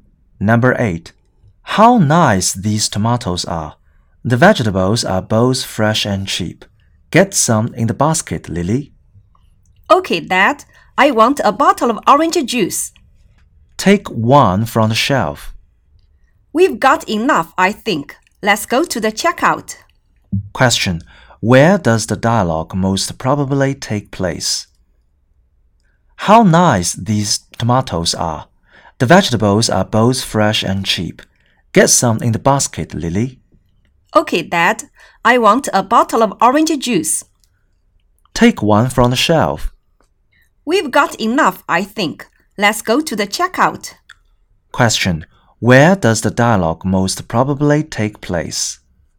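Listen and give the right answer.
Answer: In a supermarket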